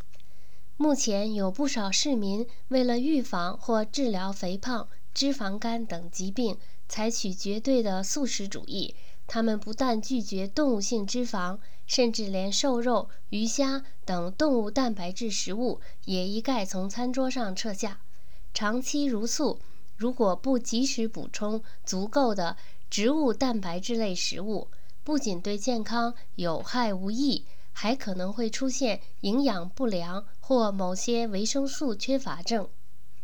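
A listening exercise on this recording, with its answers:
Please answer the following questions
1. 人们为什么要吃素?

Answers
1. 为了预防或治疗肥胖、脂肪肝等疾病

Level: 3rd Year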